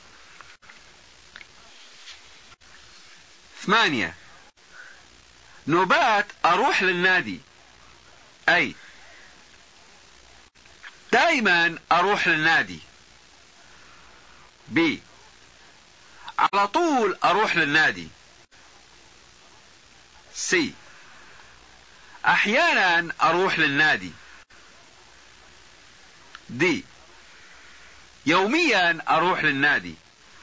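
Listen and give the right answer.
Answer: C: احيانا اروح للنادي.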